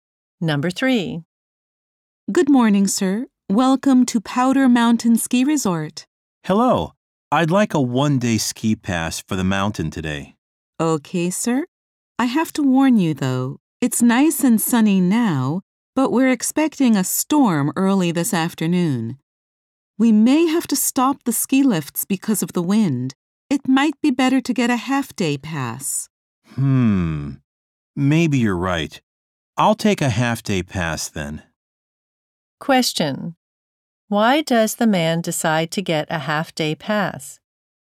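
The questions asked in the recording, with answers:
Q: Why does the man decide to get a half-day pass?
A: A storm is expected in the afternoon and the lifts may stop.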